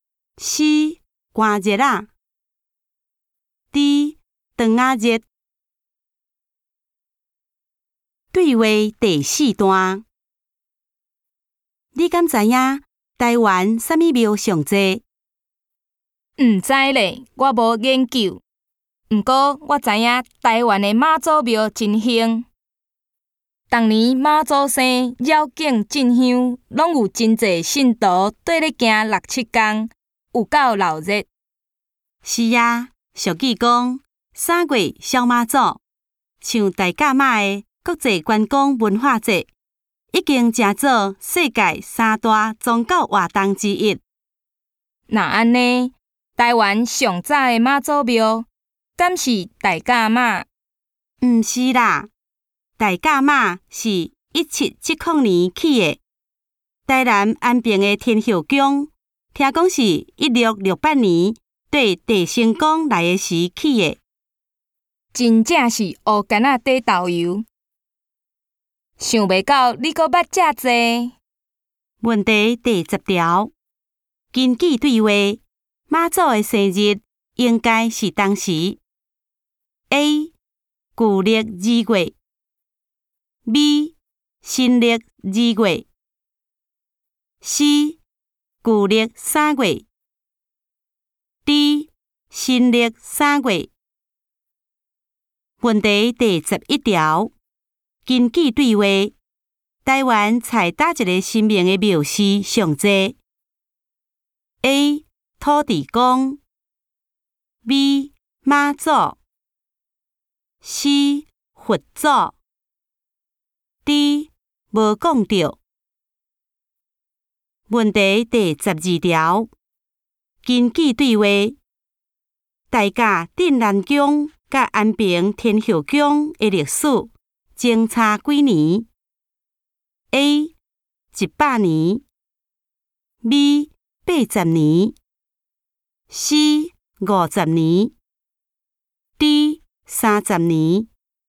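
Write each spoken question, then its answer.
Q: 根据对话,妈祖的生日应该是当时 :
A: C: 旧历三月

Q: 根据对话,大甲镇南宫甲安平天后宫的历史。相差几年?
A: A: 一百年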